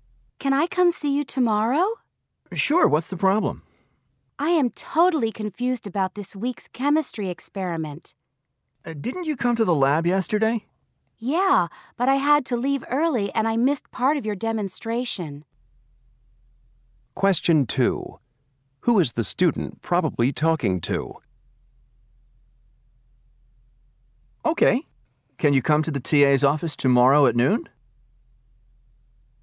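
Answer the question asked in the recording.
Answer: The chemistry teaching assistant (TA)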